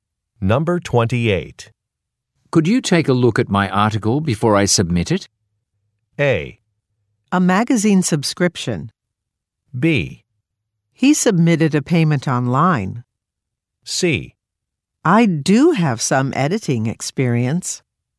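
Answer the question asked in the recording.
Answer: C: I do have some editing experience.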